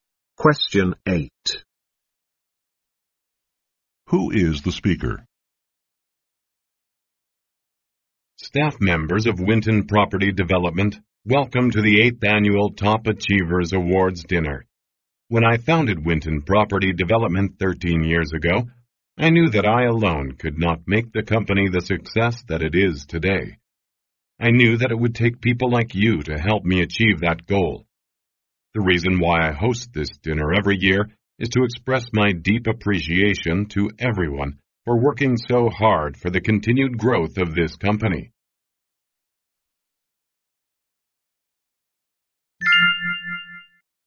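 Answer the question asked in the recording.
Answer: The founder of Winton Property Development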